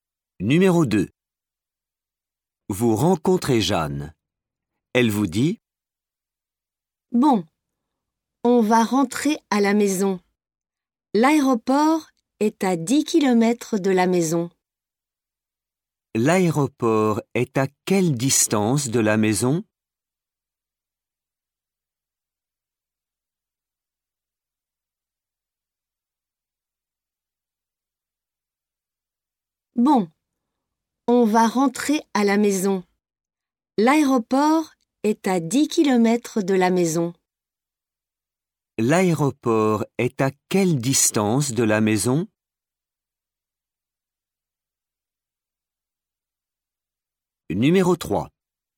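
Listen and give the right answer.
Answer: 10 km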